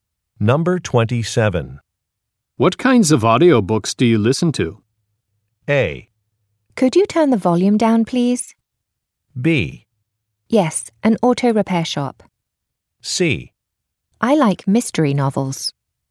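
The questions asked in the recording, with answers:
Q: What kinds of audiobooks do you listen to?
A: C: I like mystery novels.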